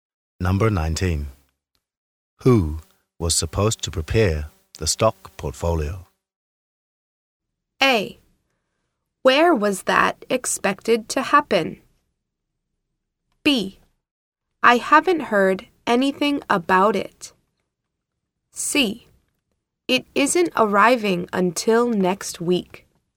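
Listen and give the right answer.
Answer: B: I haven't heard anything about it.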